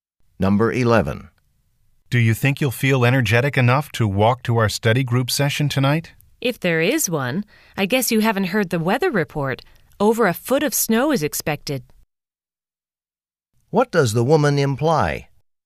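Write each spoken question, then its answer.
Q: What does the woman imply?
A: The study session will probably be canceled because of the snow.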